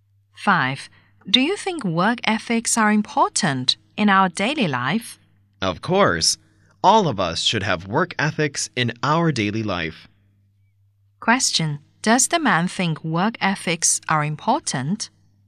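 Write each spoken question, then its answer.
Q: Does the man think work ethics are important?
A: Yes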